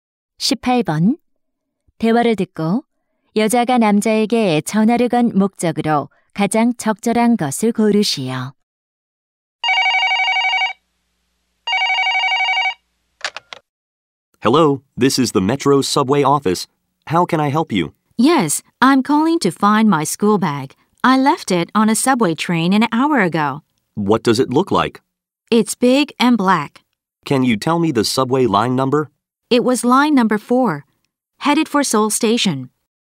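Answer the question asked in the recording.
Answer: 지하철에 두고 내린 책가방을 찾으려고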